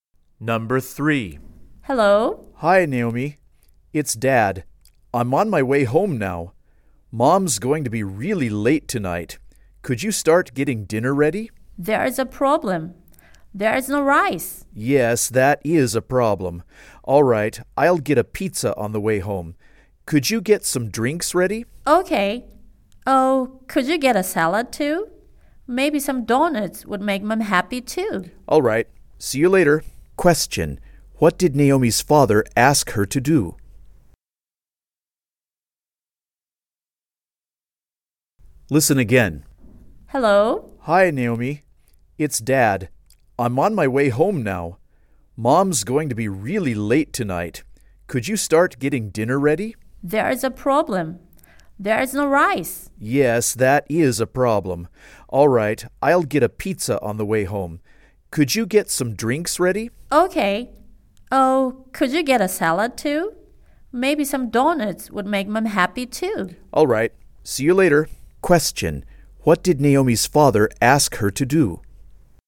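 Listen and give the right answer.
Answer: Get some drinks ready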